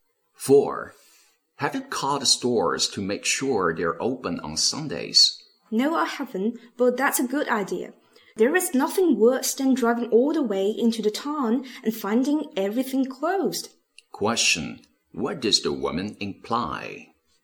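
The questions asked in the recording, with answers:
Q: What does the woman imply?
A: She will call the stores before going.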